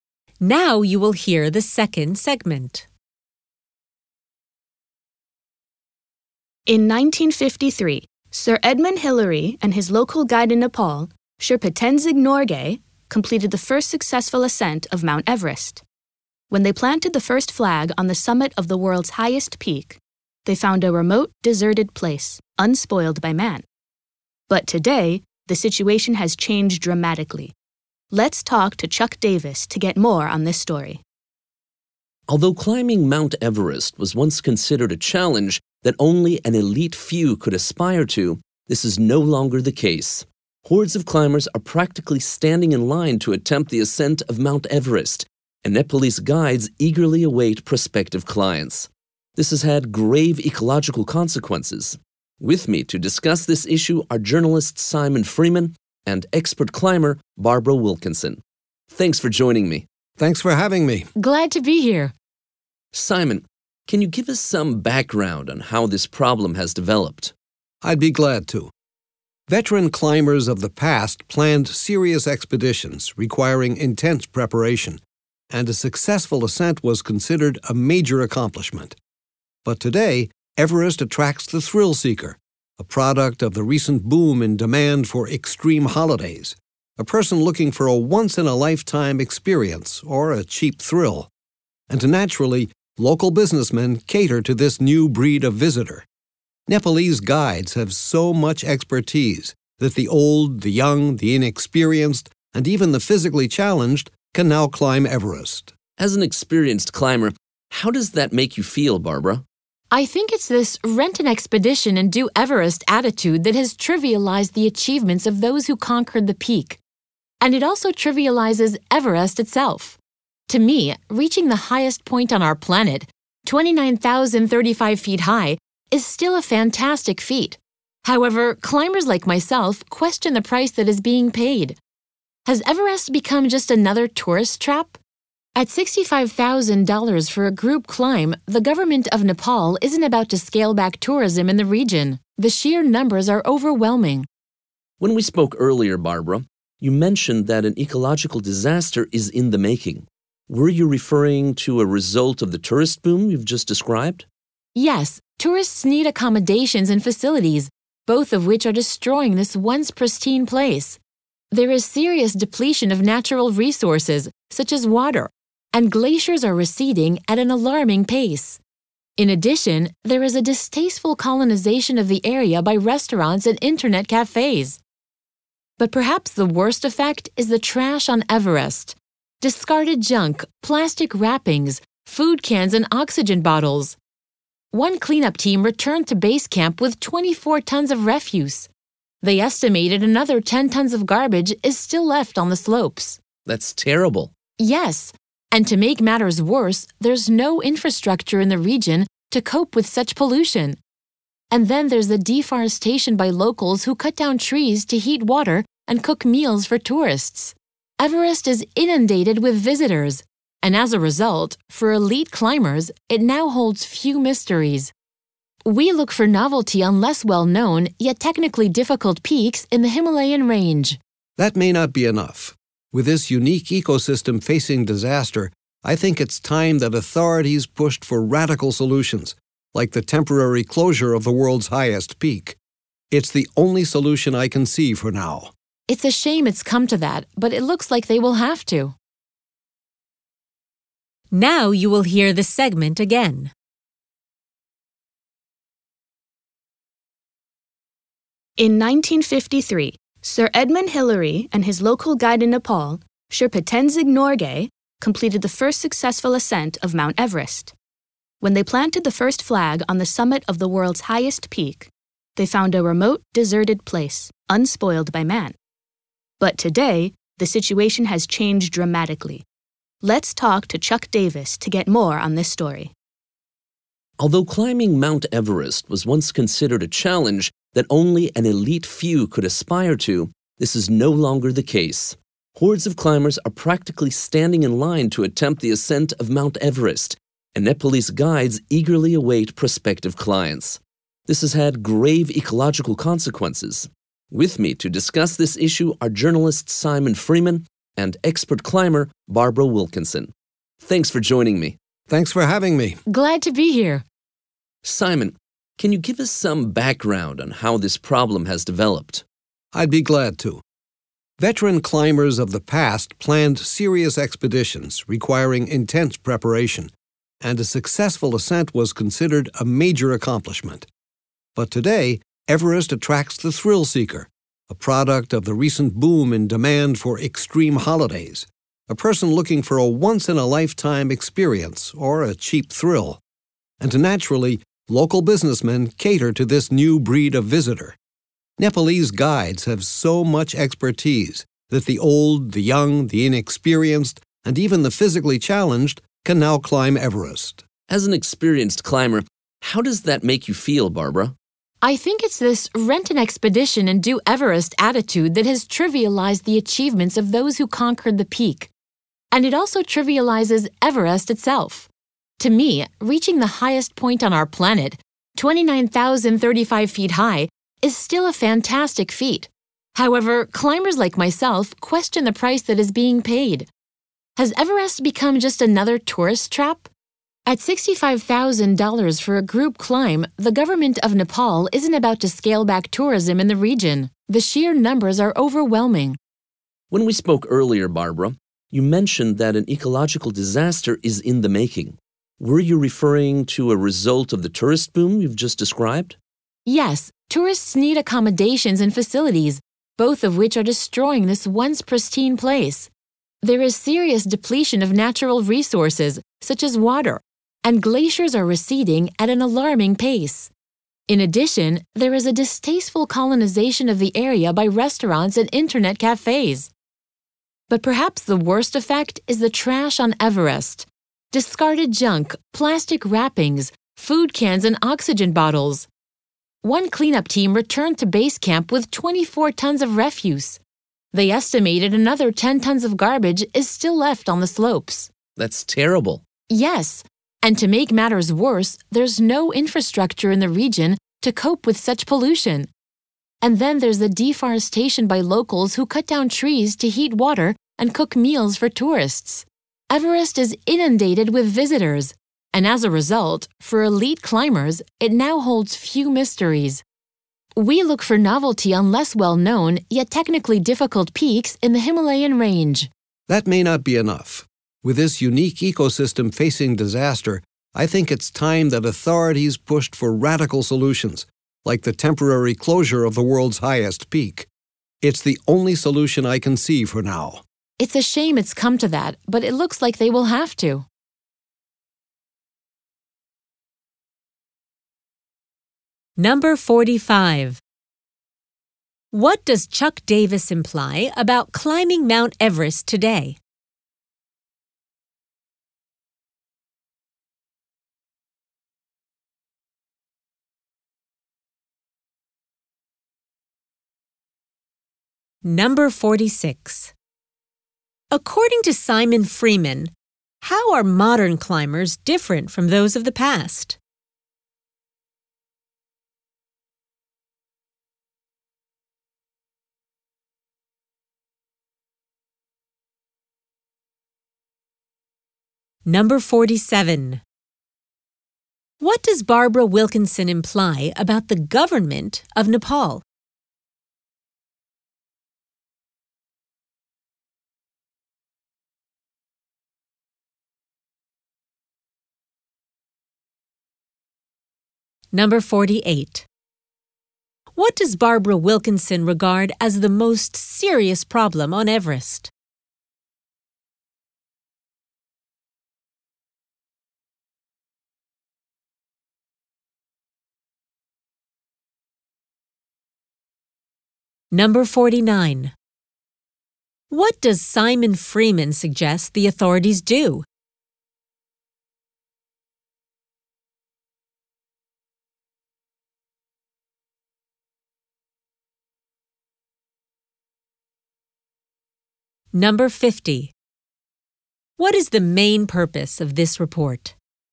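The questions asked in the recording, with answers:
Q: What does Chuck Davis imply about climbing Mount Everest today?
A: It is no longer only for an elite few; huge numbers now attempt it

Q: According to Simon Freeman, how are modern climbers different from those of the past?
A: They are thrill seekers, not seriously prepared expedition climbers

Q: What does Barbara Wilkinson imply about the government of Nepal?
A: It profits from climbers and will not reduce tourism

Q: What does Barbara Wilkinson regard as the most serious problem on Everest?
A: The trash left on the mountain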